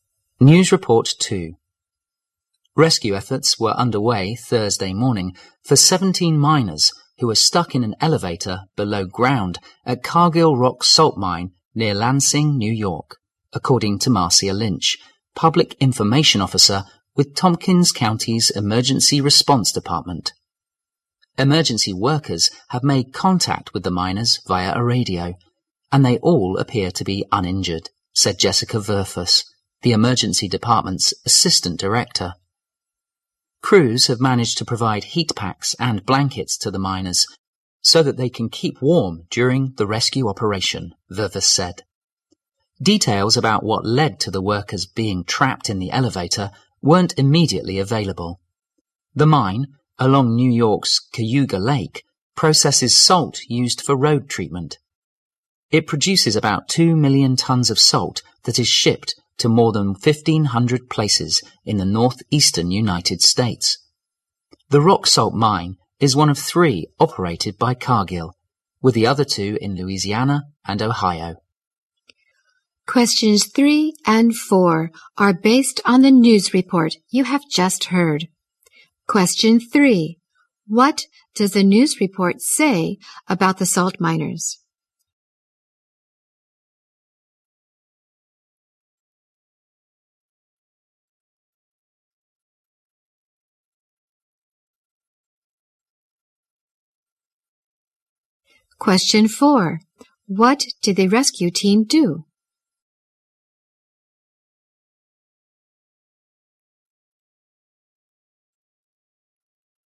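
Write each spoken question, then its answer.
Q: What does the news report say about the salt miners?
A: 17 miners were stuck in an elevator below ground, uninjured

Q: What did the rescue team do?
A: Provided heat packs and blankets to keep the miners warm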